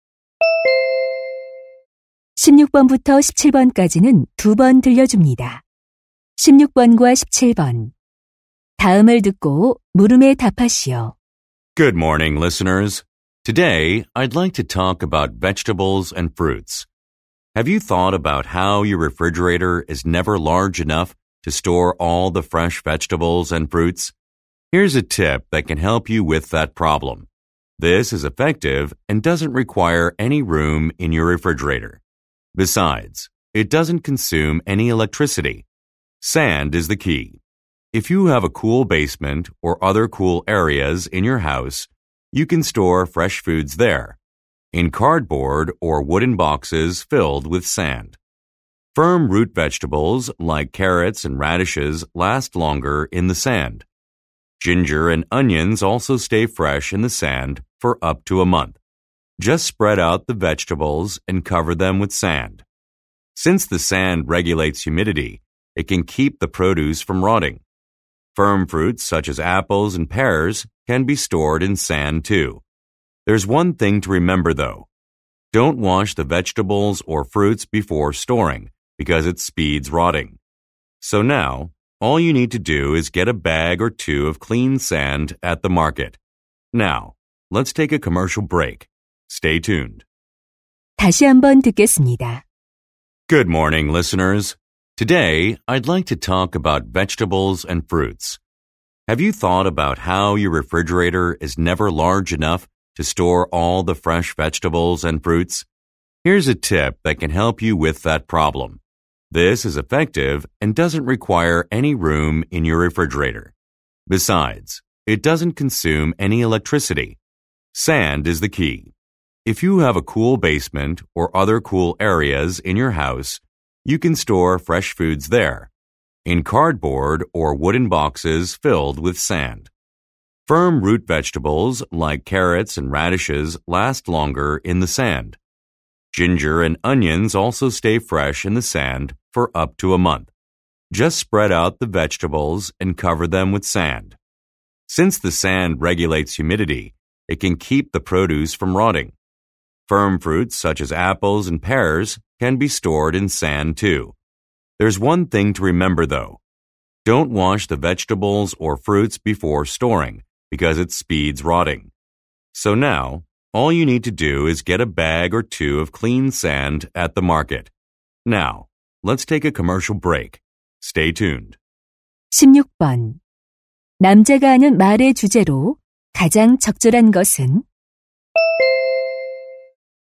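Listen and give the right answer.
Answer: 모래를 이용해 채소와 과일을 신선하게 보관하는 방법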